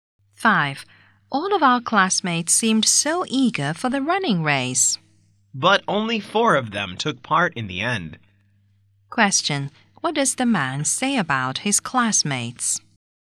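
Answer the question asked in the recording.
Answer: Only four of them took part in the race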